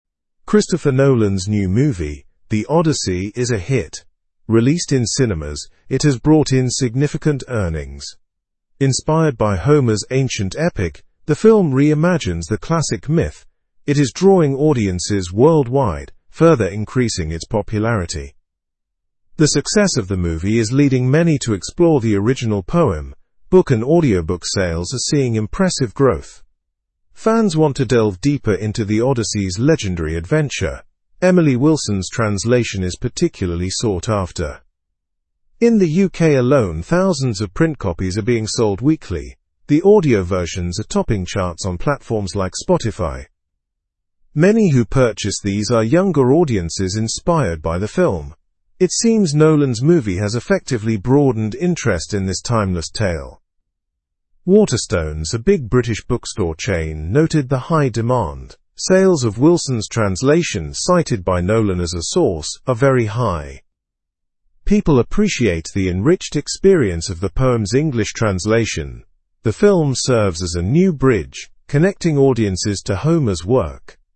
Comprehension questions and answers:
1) What is Christopher Nolan's new movie called?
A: The Odyssey.

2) What has the release of the film affected besides cinema earnings?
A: It has increased book and audiobook sales.

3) Which translation of The Odyssey is being sought after?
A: Emily Wilson's translation.

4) What age group seems particularly interested in buying these books?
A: Younger audiences.

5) How are audiobook versions performing on digital platforms?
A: They are topping charts on platforms like Spotify.

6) Which bookstore chain noted increased demand for the book?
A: Waterstones.

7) What role does the film play in relation to Homer's work?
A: It serves as a bridge connecting audiences to the work.

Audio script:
Christopher Nolan's new movie, The Odyssey, is a hit. Released in cinemas, it has brought in significant earnings. Inspired by Homer's ancient epic, the film reimagines the classic myth. It is drawing audiences worldwide, further increasing its popularity.
The success of the movie is leading many to explore the original poem. Book and audiobook sales are seeing impressive growth. Fans want to delve deeper into The Odyssey's legendary adventure. Emily Wilson's translation is particularly sought after.
In the UK alone, thousands of print copies are being sold weekly. The audio versions are topping charts on platforms like Spotify. Many who purchase these are younger audiences inspired by the film. It seems Nolan's movie has effectively broadened interest in this timeless tale.
Waterstones, a big British bookstore chain, noted the high demand. Sales of Wilson's translation, cited by Nolan as a source, are very high. People appreciate the enriched experience of the poem's English translation.

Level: Level 3